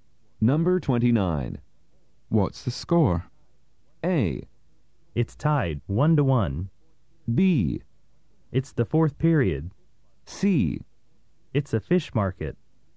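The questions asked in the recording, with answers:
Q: What's the score?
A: A: It's tied, 1-1.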